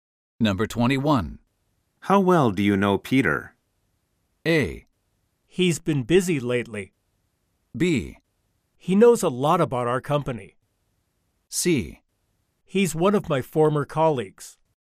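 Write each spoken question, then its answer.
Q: How well do you know Peter?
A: C: He's one of my former colleagues.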